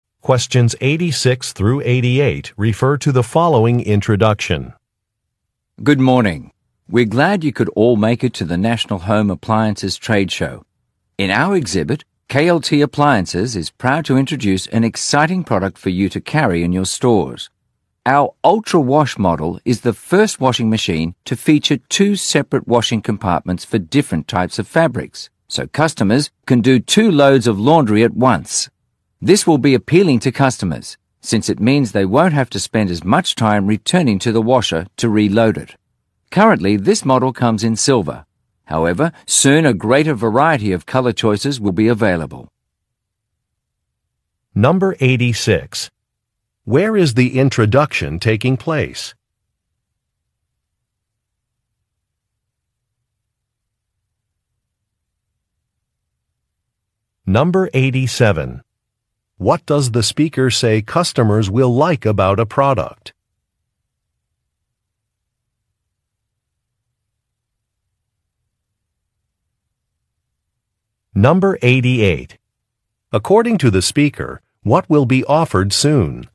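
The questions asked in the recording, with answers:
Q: Where is the introduction taking place?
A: At a trade show

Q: What does the speaker say customers will like about a product?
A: It saves time, since they can do two loads of laundry at once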